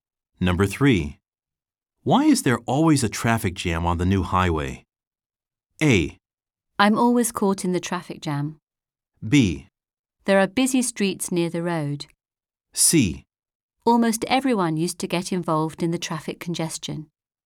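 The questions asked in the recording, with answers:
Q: Why is there always a traffic jam on the new highway?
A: B: There are busy streets near the road.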